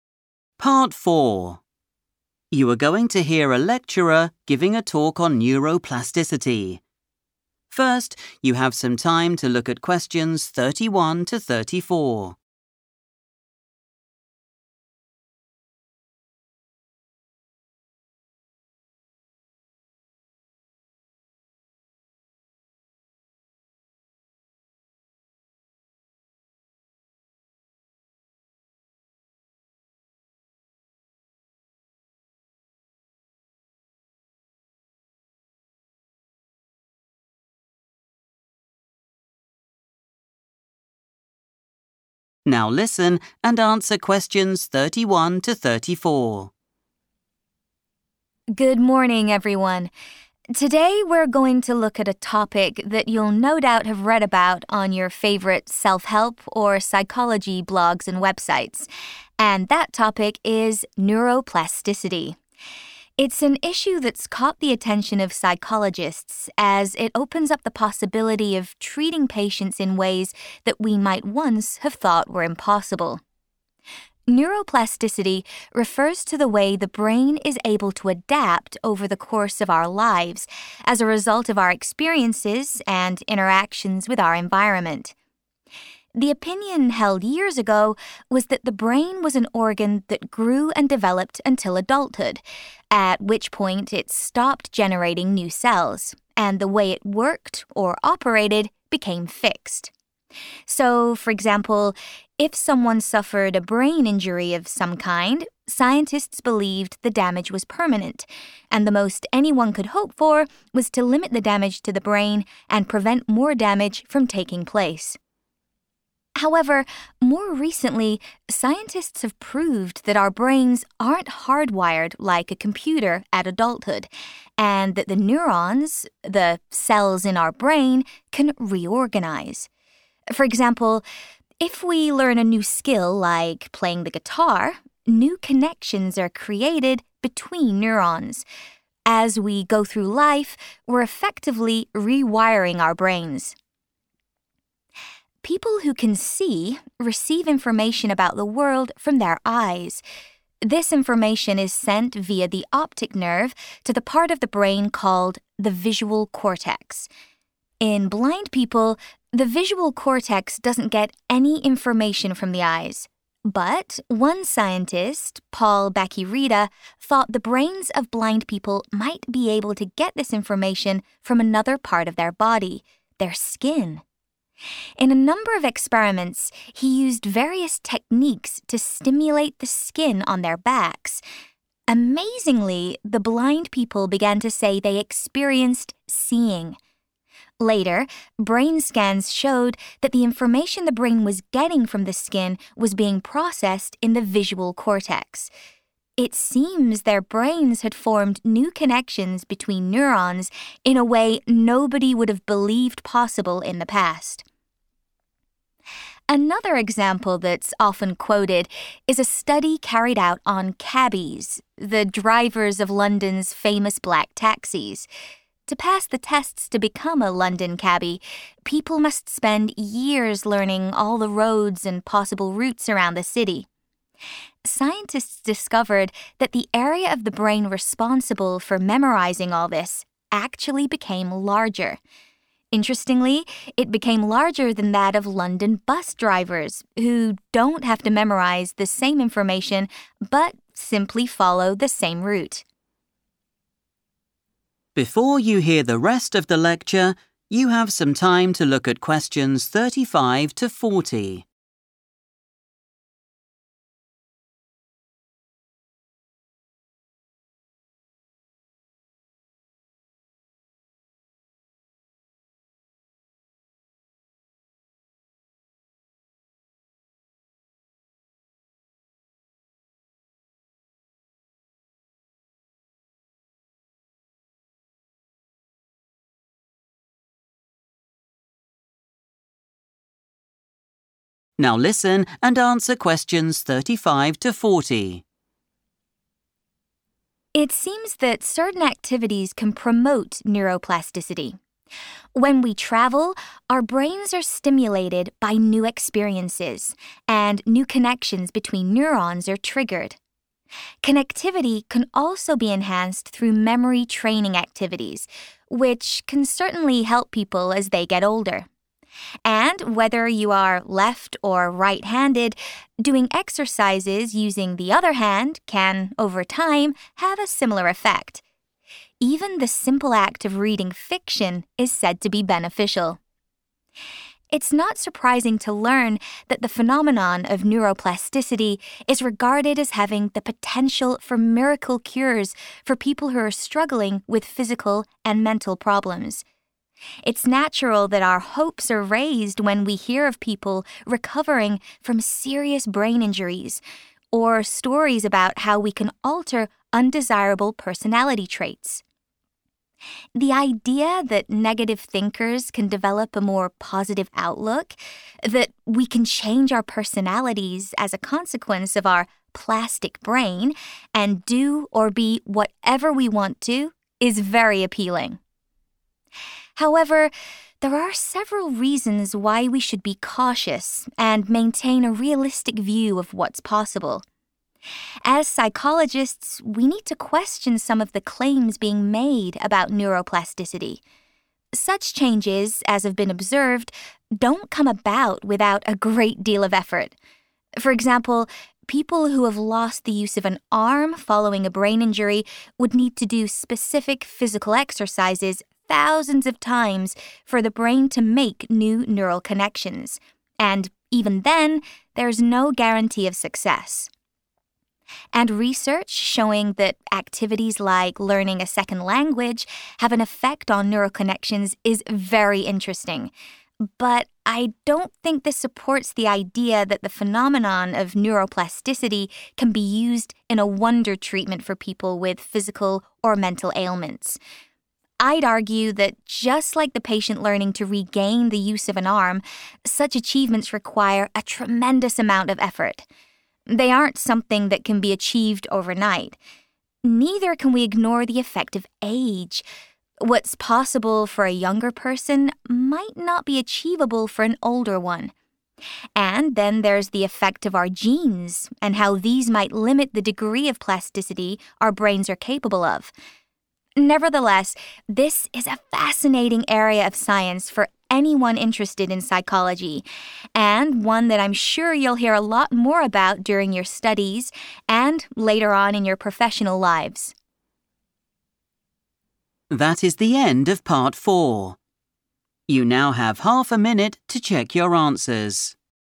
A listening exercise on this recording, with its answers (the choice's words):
Choose the correct letter, A, B or C.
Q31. In the past, scientists believed that our brain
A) developed new cells after adulthood.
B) was left unprotected after an injury.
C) stopped developing at a certain time in our lives.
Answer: stopped developing at a certain time in our lives.

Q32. The latest research shows that our brains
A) have become more effective at learning new skills.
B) continue to change throughout our lives.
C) work in a similar way to a computer.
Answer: continue to change throughout our lives.

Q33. What did Paul Bach-y-Rita claim his research showed?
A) The brain can develop new neural connections to enable sight.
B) Brain scans can help blind people see.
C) There were a number of causes of sight loss.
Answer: The brain can develop new neural connections to enable sight.

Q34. Scientists working with taxi drivers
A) set them certain memory tests.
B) compared their brains to those of other drivers.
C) spent years doing their research.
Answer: compared their brains to those of other drivers.

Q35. Experiences gained when we _____ can lead to new connections being formed in the brain.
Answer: travel

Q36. The elderly can help themselves by doing _____ training exercises.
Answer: memory

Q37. Changing the _____ use for everyday activities can have an impact on our brain.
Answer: hand

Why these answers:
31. The correct answer is C because the speaker explains that scientists used to believe the brain only grew and changed until adulthood. After that point, they thought it stayed the same forever. Key terms like 'grew and developed until adulthood' and 'became fixed' show that they believed development ended at a specific age.
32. The correct answer is B because the text introduces the concept of 'neuroplasticity' as a major topic in psychology today. While older opinions suggested that the brain's cells were 'fixed' once a person became an adult, 'more recently scientists have proved' that this is incorrect. This 'latest research' shows that the brain is 'able to adapt over the course of our lives' and can 're-organise' itself. Words like 'adapt', 're-wire', and 're-organise' all describe the process of change mentioned in choice B.
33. The correct answer is A because the transcript describes an experiment by Paul Bach-y-Rita where blind people began to experience 'seeing' through stimulations on their skin. This was possible because their brains created new pathways or links (connections) between brain cells (neurons) to process visual information in a way that was previously thought impossible.
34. The correct answer is B because the lecturer describes a study where scientists looked at the brains of London taxi drivers and bus drivers. By looking at both groups, they found that the taxi drivers' brains had a larger area for memory. To 'compare' means to look at two or more things to find how they are the same or different. In this case, the scientists compared taxi drivers to bus drivers.
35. The correct answer is "travel" because the lecturer identifies it as an activity that helps the brain. When people visit new places, the brain receives "new experiences." These experiences then cause "new connections" to form between the brain's cells (neurons).
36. The correct answer is correct because the lecturer explains that certain activities keep the brain active and create new connections. Specifically, the text says that "memory training activities" are helpful for people as they age. In the task, "The elderly" matches "people as they get older" in the transcript, making "memory" the word that identifies the type of training.
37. The correct answer is correct because the lecturer mentions that using the hand you do not normally use—for example, a right-handed person using their left hand—acts as an exercise that helps the brain create new connections (neuroplasticity). This shows that changing which hand you use for daily tasks can change the brain.

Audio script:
Lecturer: Good morning, everyone. Today we're going to look at a topic that you'll no doubt have read about on your favourite self-help or psychology blogs and websites, and that topic is neuroplasticity. It's an issue that's caught the attention of psychologists as it opens up the possibility of treating patients in ways that we might once have thought were impossible.
Neuroplasticity refers to the way the brain is able to adapt over the course of our lives as a result of our experiences and interactions with our environment. The opinion held years ago was that the brain was an organ that grew and developed until adulthood, at which point it stopped generating new cells, and the way it worked or operated became fixed. So, for example, if someone suffered a brain injury of some kind, scientists believed the damage was permanent and the most anyone could hope for was to limit the damage to the brain and prevent more damage from taking place.
However, more recently scientists have proved that our brains aren't hard-wired like a computer at adulthood, and that the neurons - the cells in our brain - can re-organise. For example, if we learn a new skill like playing the guitar, new connections are created between neurons. As we go through life, we're effectively re-wiring our brains.
People who can see receive information about the world from their eyes. This information is sent via the optic nerve to the part of the brain called the visual cortex. In blind people, the visual cortex doesn't get any information from the eyes, but one scientist, Paul Bach-y-Rita, thought the brains of blind people might be able to get this information from another part of their body, their skin. In a number of experiments, he used various techniques to stimulate the skin on their backs. Amazingly, the blind people began to say they experienced 'seeing'. Later, brain scans showed that the information the brain was getting from the skin was being processed in the visual cortex. It seems their brains had formed new connections between neurons in a way nobody would have believed possible in the past.
Another example that's often quoted is a study carried out on cabbies - the drivers of London's famous black taxis. To pass the tests to become a London cabbie, people must spend years learning all the roads and possible routes around the city. Scientists discovered that the area of the brain responsible for memorising all this actually became larger. Interestingly, it became larger than that of London bus drivers, who don't have to memorise the same information but simply follow the same route.
It seems that certain activities can promote neuroplasticity. When we travel, our brains are stimulated by new experiences, and new connections between neurons are triggered. Connectivity can also be enhanced through memory training activities, which can certainly help people as they get older. And whether you are left- or right-handed, doing exercises using the other hand can, over time, have a similar effect. Even the simple act of reading fiction is said to be beneficial.
It's not surprising to learn that the phenomenon of neuroplasticity is regarded as having the potential for miracle cures for people who are struggling with physical and mental problems. It's natural that our hopes are raised when we hear of people recovering from serious brain injuries or stories about how we can alter undesirable personality traits. The idea that negative thinkers can develop a more positive outlook, that we can change our personalities as a consequence of our 'plastic brain' and do or be whatever we want to is very appealing.
However, there are several reasons why we should be cautious and maintain a realistic view of what's possible. As psychologists, we need to question some of the claims being made about neuroplasticity. Such changes as have been observed don't come about without a great deal of effort. For example, people who have lost the use of an arm following a brain injury would need to do specific physical exercises thousands of times for the brain to make new neural connections, and even then, there's no guarantee of success. And research showing that activities like learning a second language have an effect on neural connections is very interesting. But I don't think this supports the idea that the phenomenon of neuroplasticity can be used in a wonder treatment for people with physical or mental ailments. I'd argue that just like the patient learning to regain the use of an arm, such achievements require a tremendous amount of effort. They aren't something that can be achieved overnight. Neither can we ignore the effect of age. What's possible for a younger person might not be achievable for an older one. And then there's the effect of our genes and how these might limit the degree of plasticity our brains are capable of. Nevertheless, this is a fascinating area of science for anyone interested in psychology and one that I'm sure you'll hear a lot more about during your studies and later on in your professional lives.